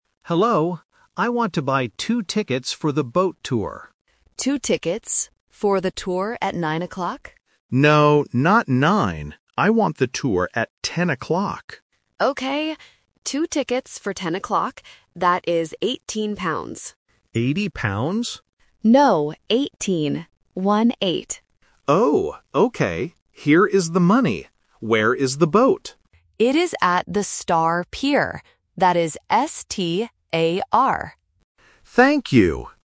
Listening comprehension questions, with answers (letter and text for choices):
Listen to the conversation at the ticket office and choose the correct answer (A, B, or C).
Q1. What time is the boat tour?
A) At 9 o'clock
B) At 10 o'clock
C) At 11 o'clock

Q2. How much are the tickets?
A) 8 pounds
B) 18 pounds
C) 80 pounds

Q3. How does the clerk spell the name of the pier?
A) S-P-A-R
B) S-T-O-R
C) S-T-A-R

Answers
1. B) At 10 o'clock
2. B) 18 pounds
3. C) S-T-A-R

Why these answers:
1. The clerk asks if the tourist wants the tour at "nine o'clock" (The Trap). The tourist says, "No, not nine. I want the tour at ten o'clock." Students must hear the word "No" to find the right answer.
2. The clerk says the price is 18 pounds. The tourist mishears it as "80 pounds" (The Trap), but the clerk corrects him: "No, 18. One-eight." This tests the student's ability to distinguish between the "-teen" and "-ty" pronunciation.
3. The clerk spells the name of the pier clearly: S-T-A-R. Option (A) uses "P" instead of "T", and Option (B) uses the wrong vowel "O".